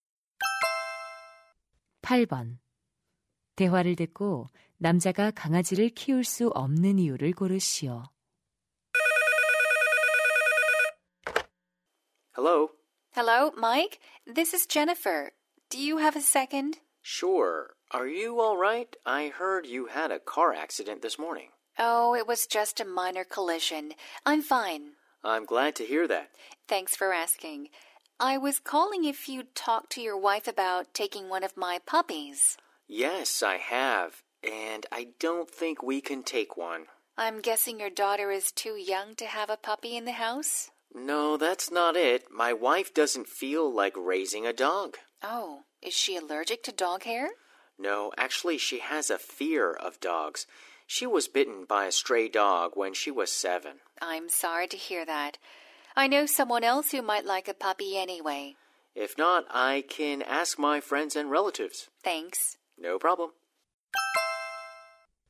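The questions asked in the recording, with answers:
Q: 대화를 듣고 남자가 강아지를 키울 수 없는 이유를 고르시오.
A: 아내가 개를 무서워해서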